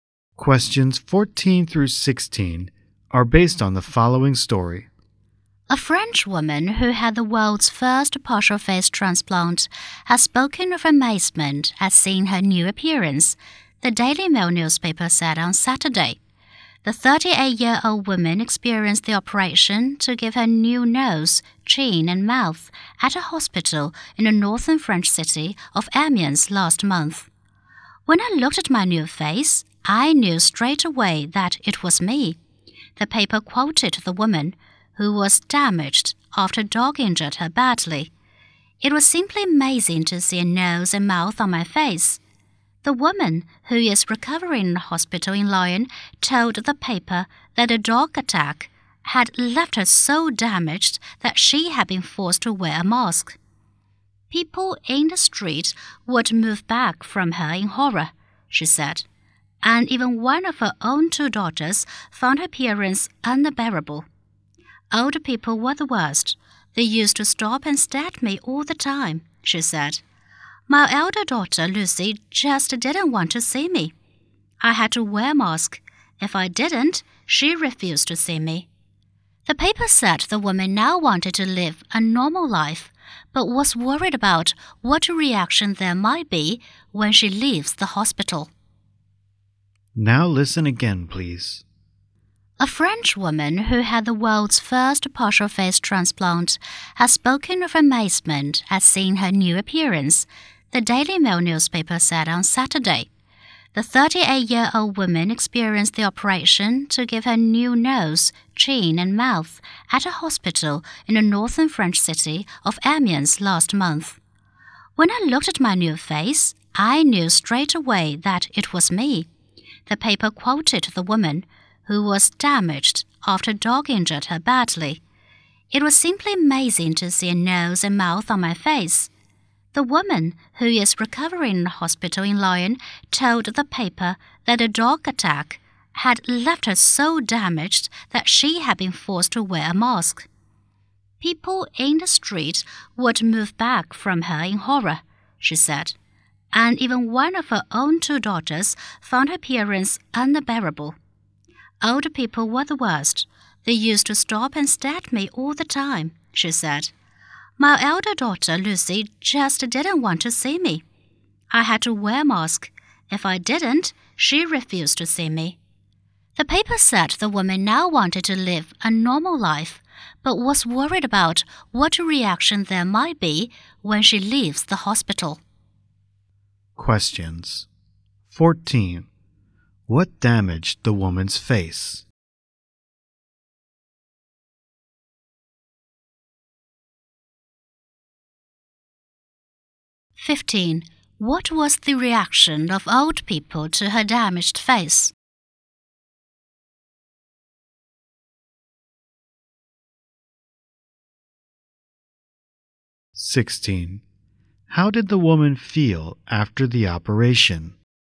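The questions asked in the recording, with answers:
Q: What damaged the woman's face?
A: A dog attack

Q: What was the reaction of old people to her damaged face?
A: They stopped and stared at her

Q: How did the woman feel after the operation?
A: Amazed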